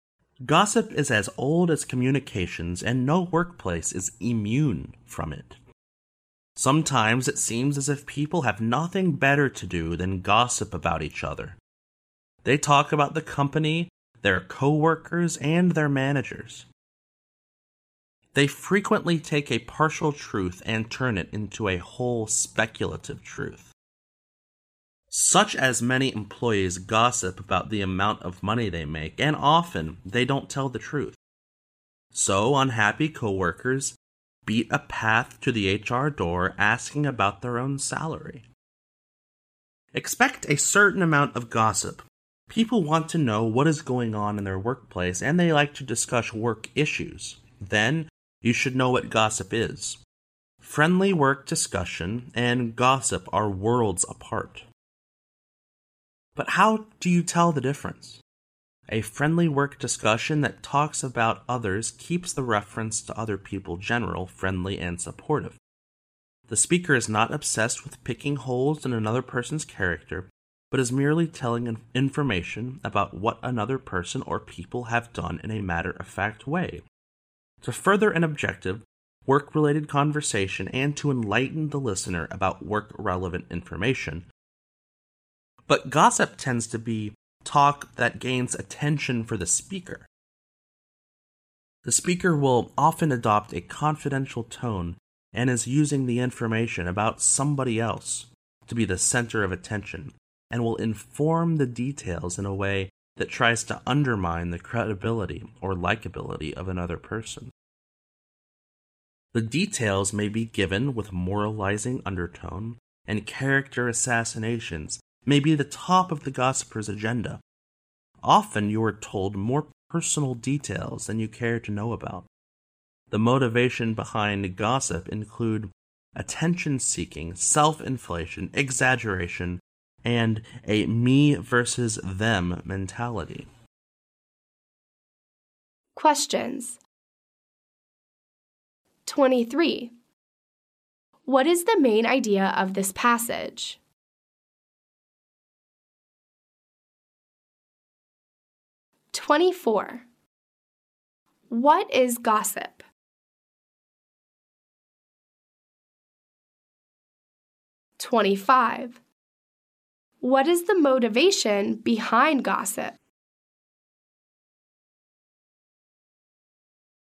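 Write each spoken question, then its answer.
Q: What is the motivation behind gossip?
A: Attention-seeking, self-inflation, exaggeration, and a me versus them mentality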